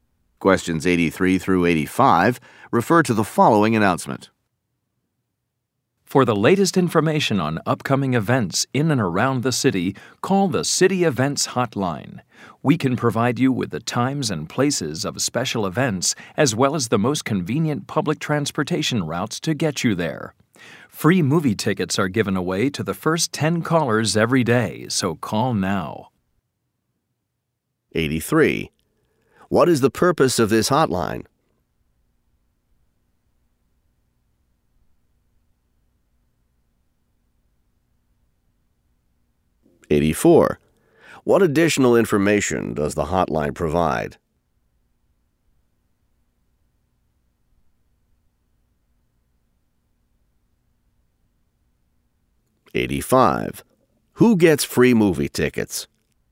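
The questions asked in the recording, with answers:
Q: What is the purpose of this hotline?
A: To give information on upcoming city events

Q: What additional information does the hotline provide?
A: Public transportation routes

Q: Who gets free movie tickets?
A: The first 10 callers every day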